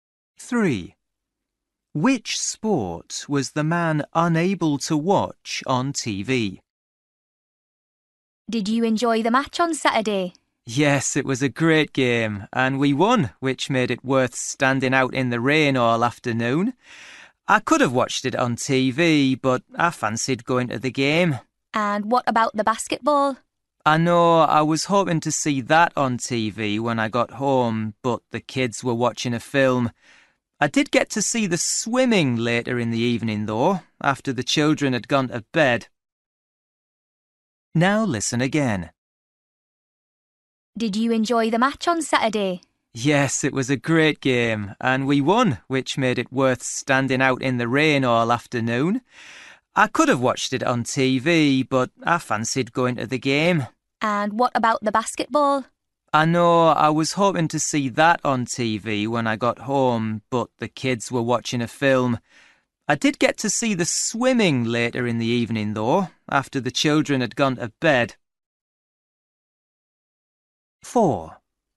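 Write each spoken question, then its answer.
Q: Which sport was the man unable to watch on TV?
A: Basketball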